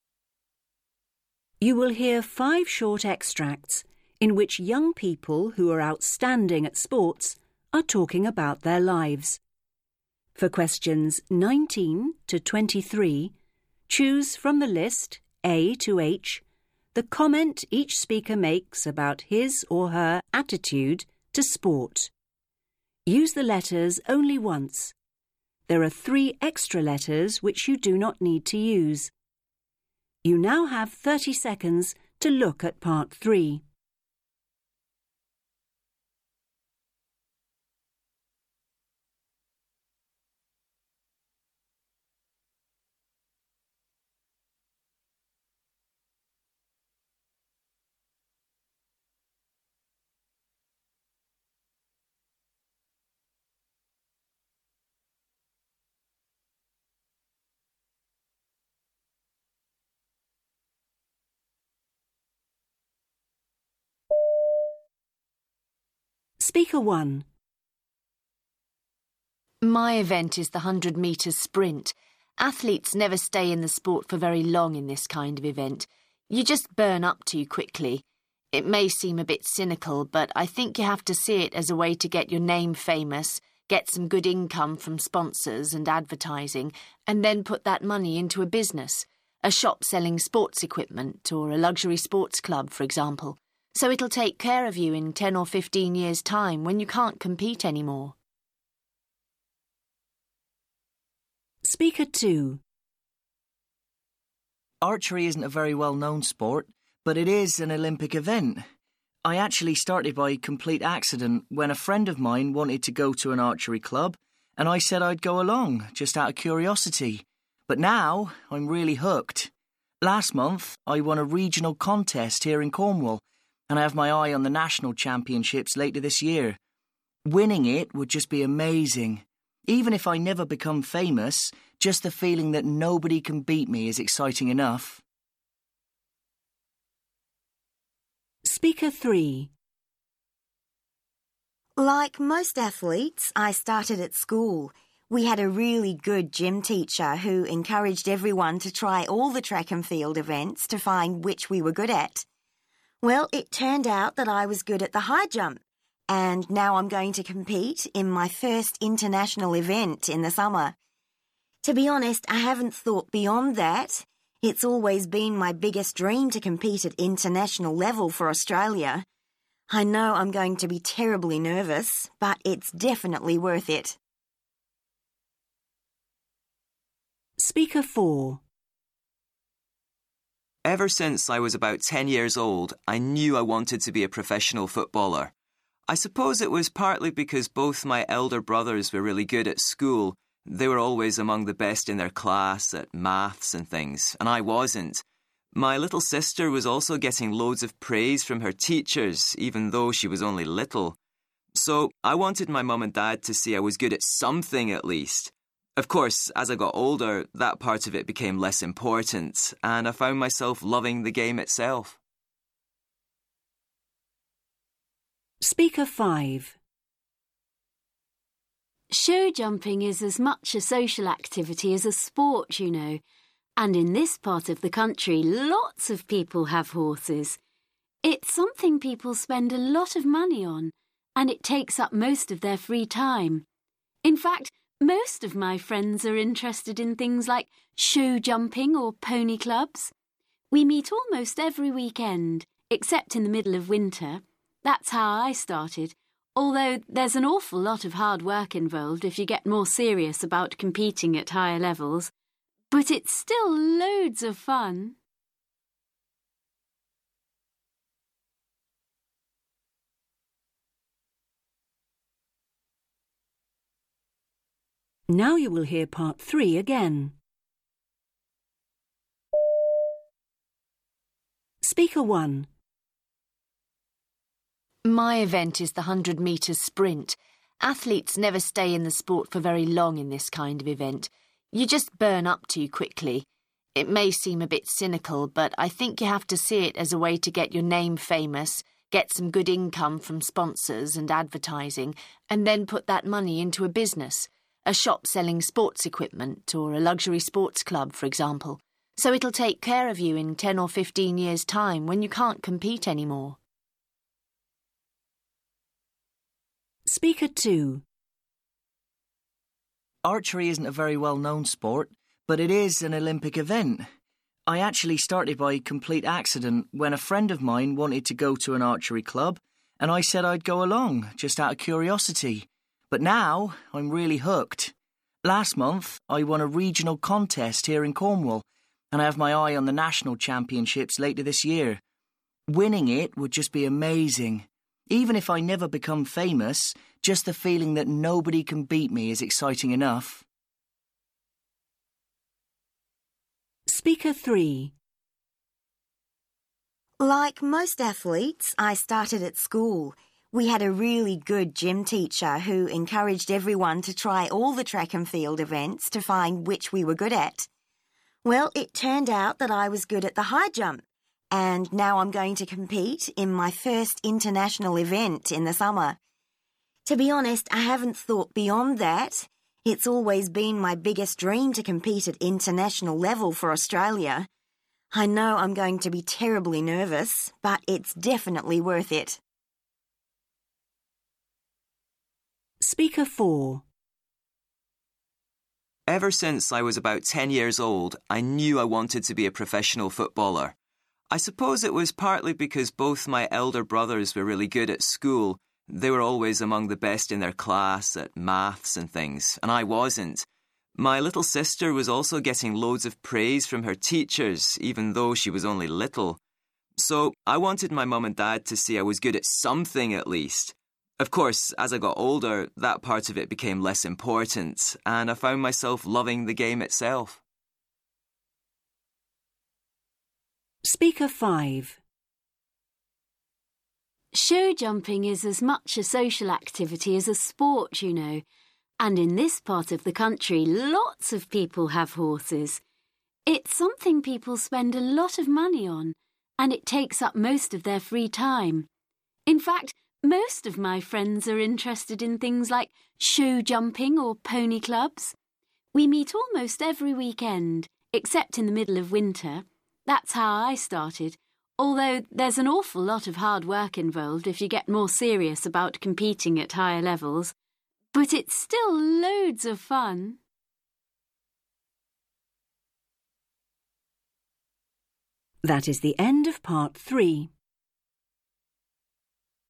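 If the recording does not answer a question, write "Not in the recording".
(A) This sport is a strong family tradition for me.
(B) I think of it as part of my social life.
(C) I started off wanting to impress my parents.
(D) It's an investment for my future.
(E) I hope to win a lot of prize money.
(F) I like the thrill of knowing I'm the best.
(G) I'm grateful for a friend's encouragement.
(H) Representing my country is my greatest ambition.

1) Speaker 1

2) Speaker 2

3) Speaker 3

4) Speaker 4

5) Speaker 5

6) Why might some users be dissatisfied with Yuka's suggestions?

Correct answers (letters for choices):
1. D
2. F
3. H
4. C
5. B
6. Not in the recording

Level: FCE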